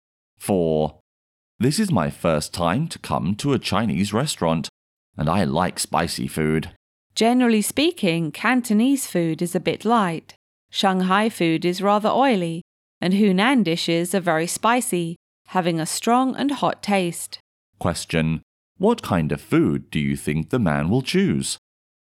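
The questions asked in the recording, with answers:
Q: Question, what kind of food do you think the man will choose?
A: Hunan food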